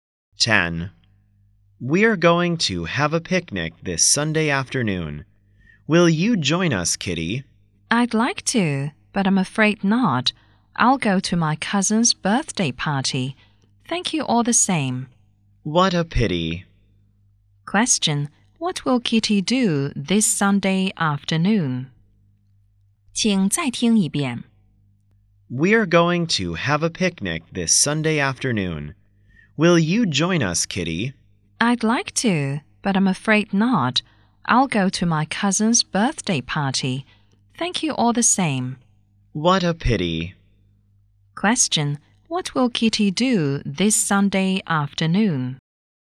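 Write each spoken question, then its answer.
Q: What will Kitty do this Sunday afternoon?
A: Go to her cousin's birthday party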